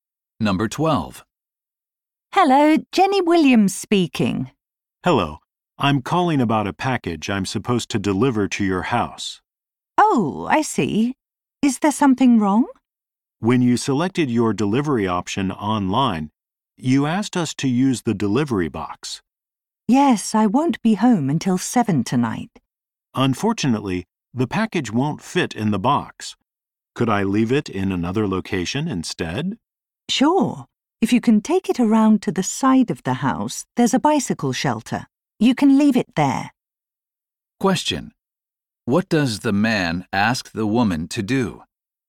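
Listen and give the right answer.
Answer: Let him leave the package somewhere else, because it won't fit in the delivery box.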